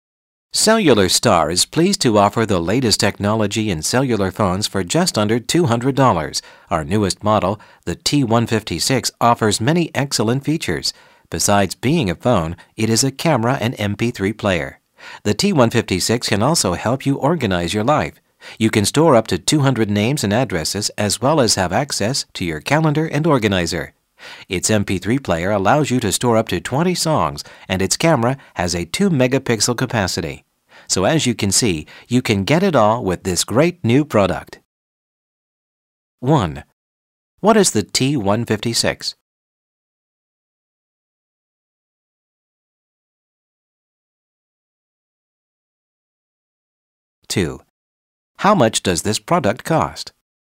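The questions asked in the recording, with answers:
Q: What is the T156?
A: A cellular phone

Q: How much does this product cost?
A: Just under $200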